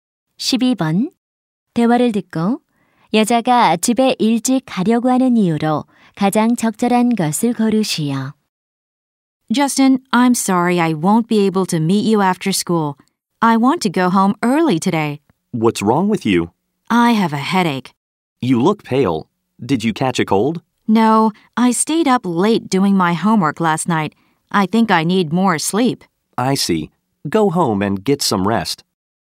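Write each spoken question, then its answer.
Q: 대화를 듣고 여자가 집에 일찍 가려고 하는 이유로 가장 적절한 것을 고르시오.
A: 머리가 아파서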